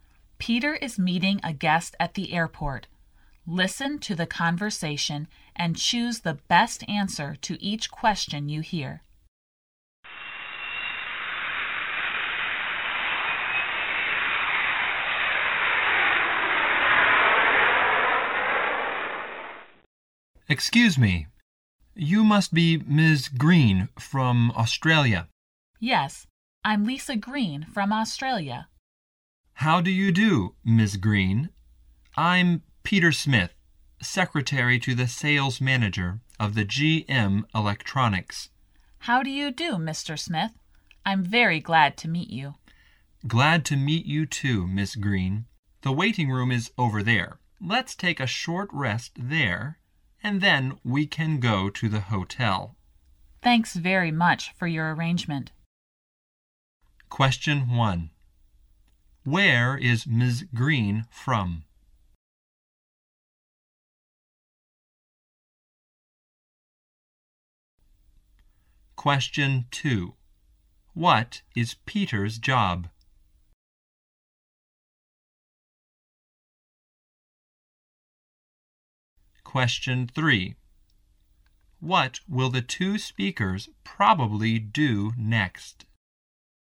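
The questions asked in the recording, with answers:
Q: Where is Ms. Green from?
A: Australia

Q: What is Peter's job?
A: Secretary to the sales manager of GM Electronics

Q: What will the two speakers probably do next?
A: Take a short rest in the waiting room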